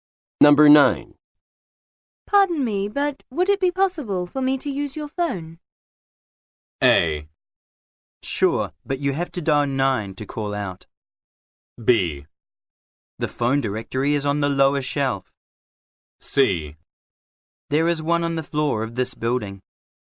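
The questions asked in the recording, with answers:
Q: Pardon me, but would it be possible for me to use your phone?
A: A: Sure, but you have to dial 9 to call out.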